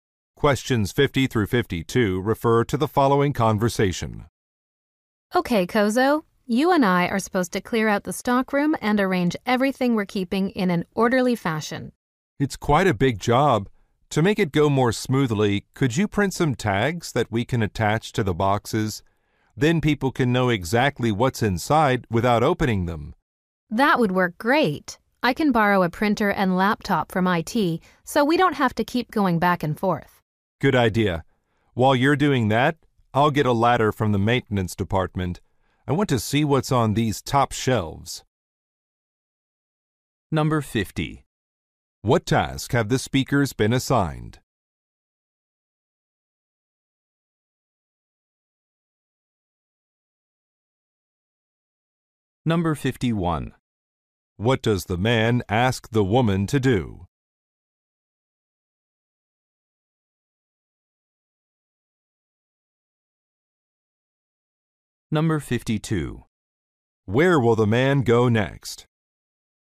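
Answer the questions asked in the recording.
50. Clearing out and organizing the stockroom
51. Print tags for the boxes
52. To the maintenance department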